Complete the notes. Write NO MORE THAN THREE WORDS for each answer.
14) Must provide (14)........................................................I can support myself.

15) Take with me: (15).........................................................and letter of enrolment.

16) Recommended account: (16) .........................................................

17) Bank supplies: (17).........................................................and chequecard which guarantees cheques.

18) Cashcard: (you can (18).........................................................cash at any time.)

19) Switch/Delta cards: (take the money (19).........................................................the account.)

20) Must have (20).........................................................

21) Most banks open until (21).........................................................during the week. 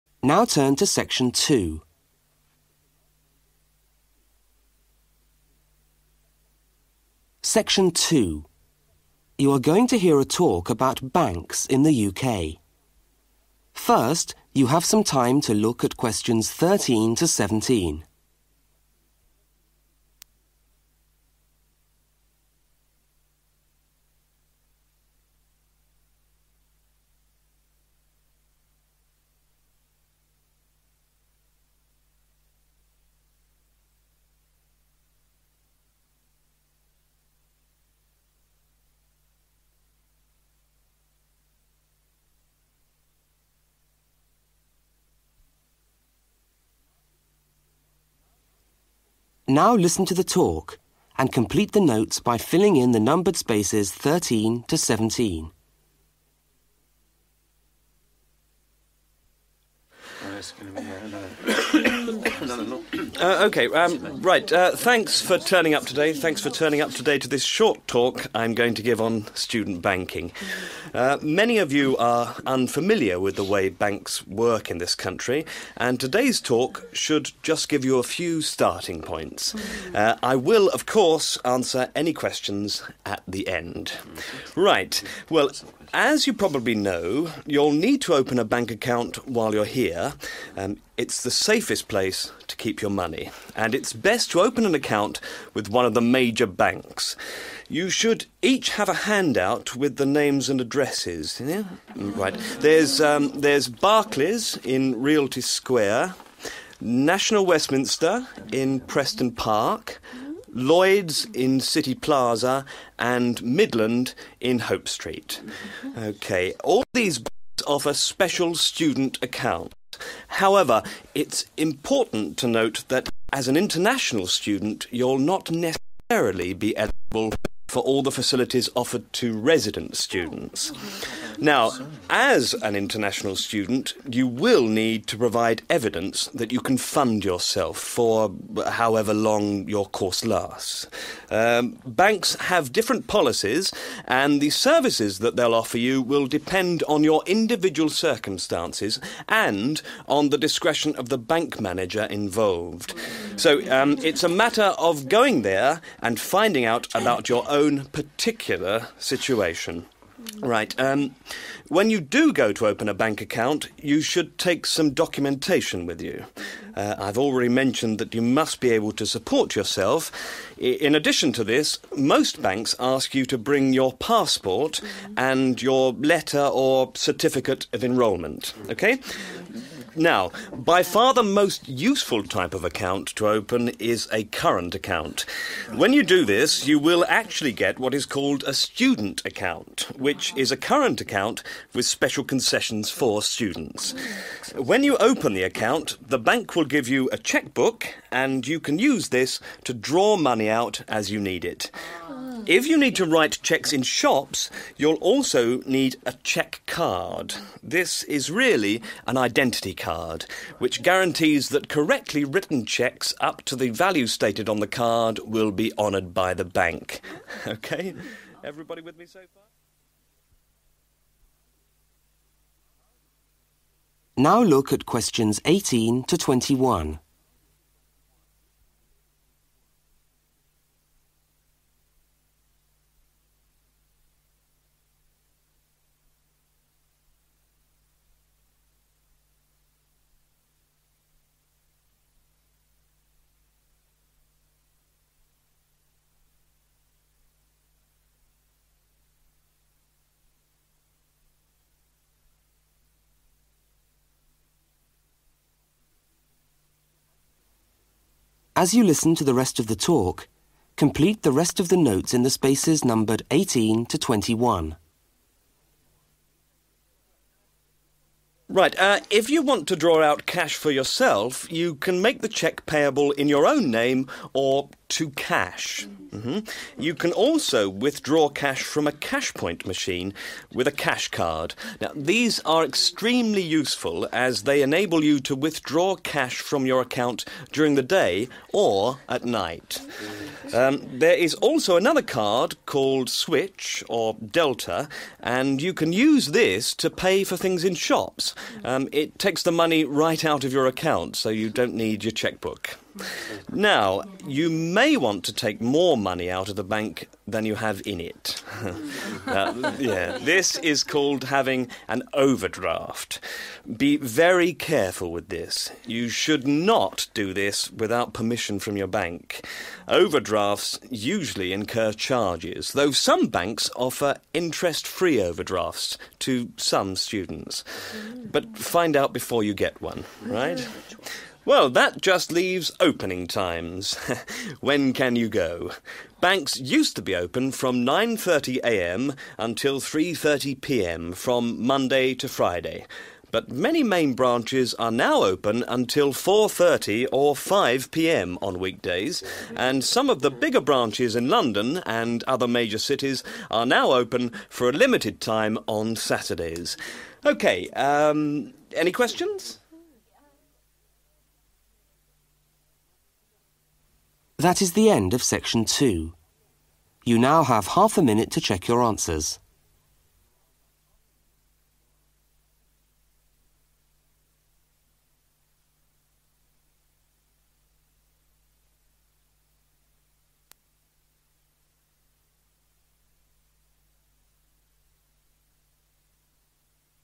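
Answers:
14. evidence
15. passport
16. current account
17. chequebook
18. withdraw
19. right out of
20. permission from your bank
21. 4:30 or 5 p.m.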